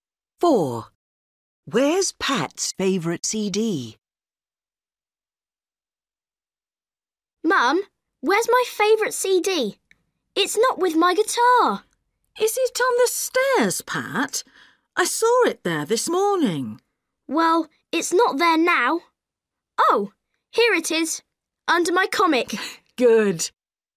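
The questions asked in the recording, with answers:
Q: Where's Pat's favorite CD?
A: Under his comic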